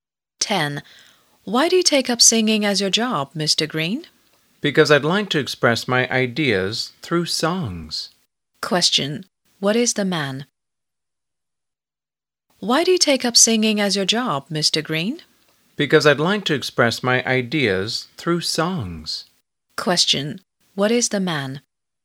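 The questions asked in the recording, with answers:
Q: What is the man?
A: A singer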